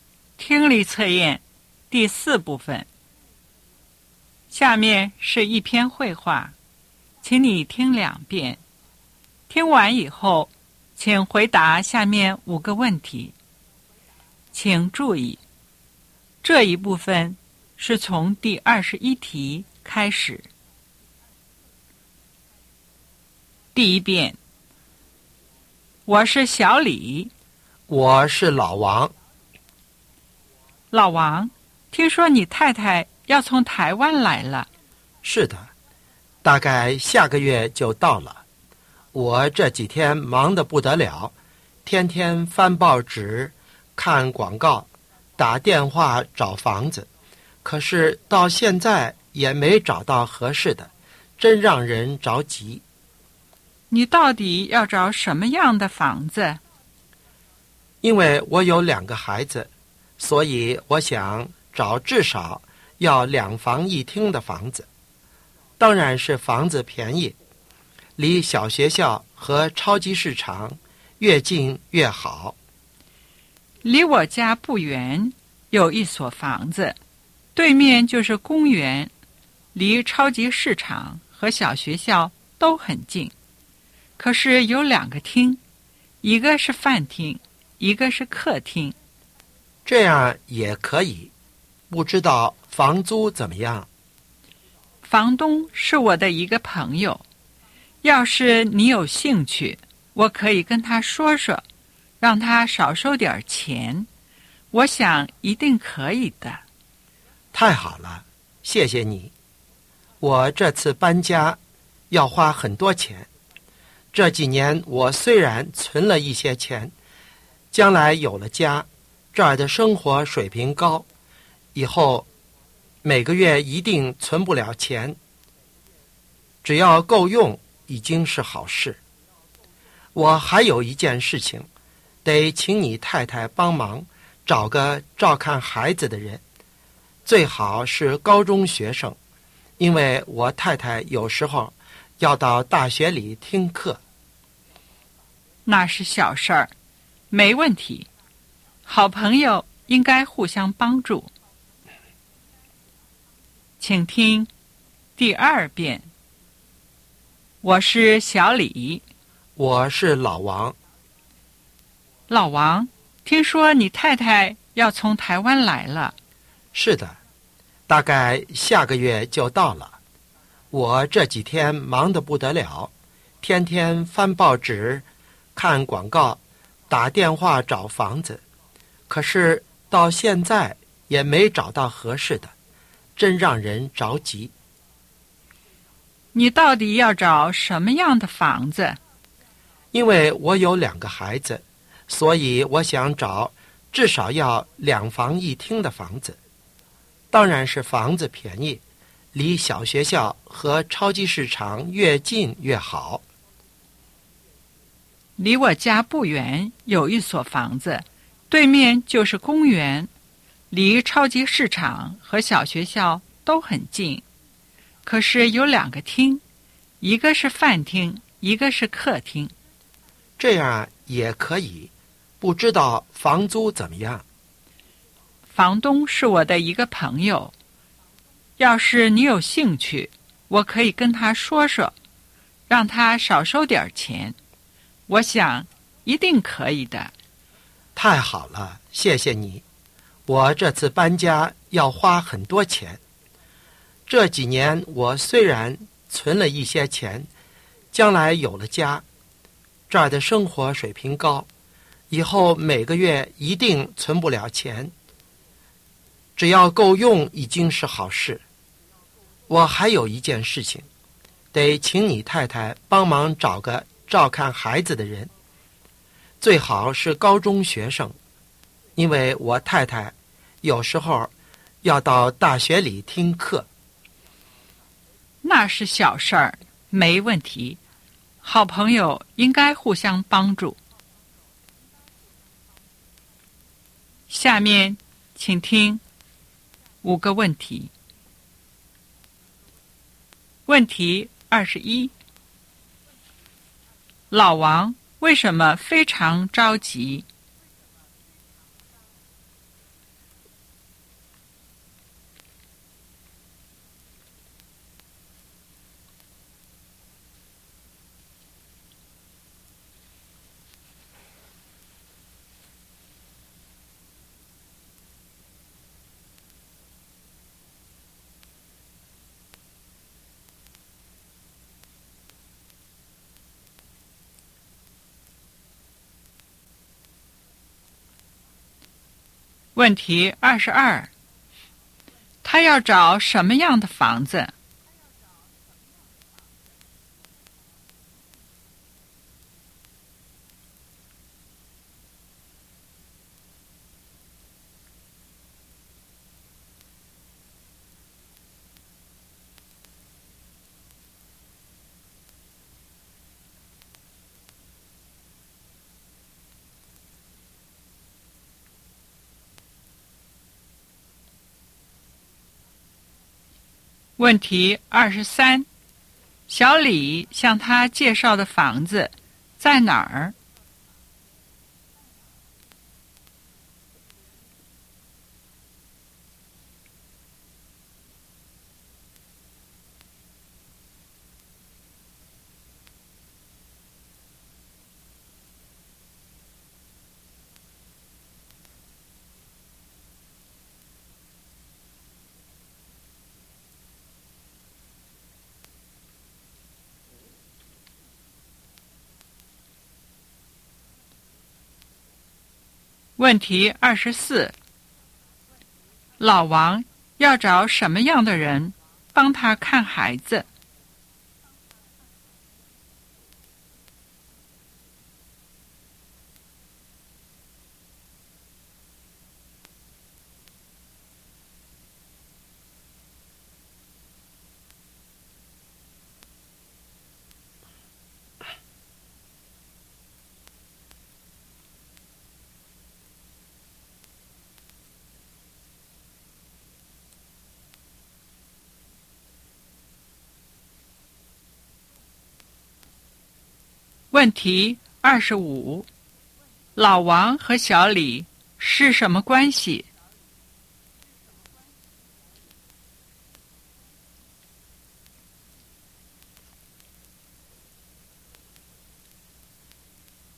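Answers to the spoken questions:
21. 太太快来了,还没找到合适的房子
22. 至少两房一厅,便宜,离小学校和超级市场近
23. 离小李家不远,对面是公园
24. 高中学生
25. 好朋友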